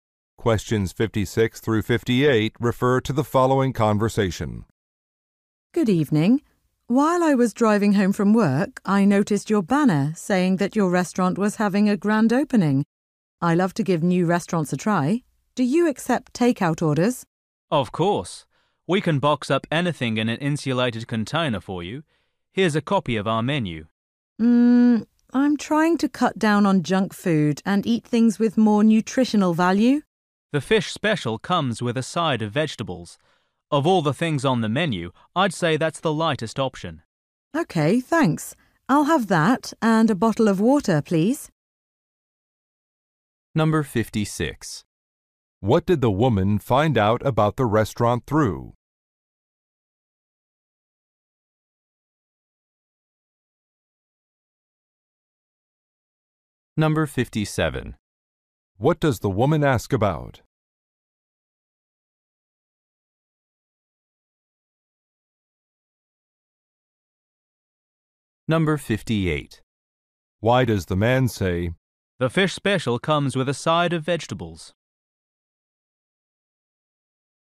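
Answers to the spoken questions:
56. A banner she saw while driving
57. Whether they accept takeout orders
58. To recommend a healthy option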